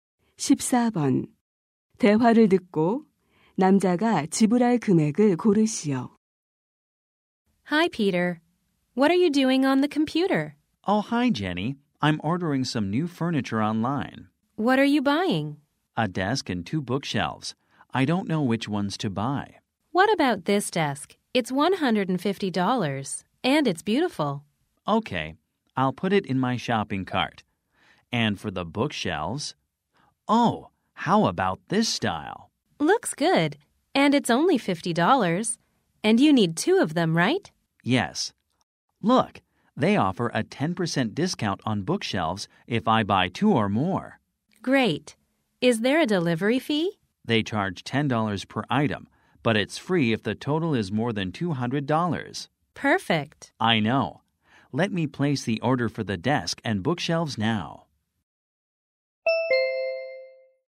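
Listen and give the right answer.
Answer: $240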